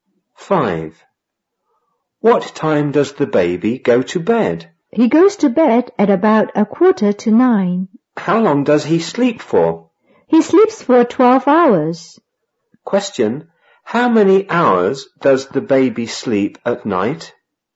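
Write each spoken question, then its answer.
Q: Question, how many hours does the baby sleep at night?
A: 12 hours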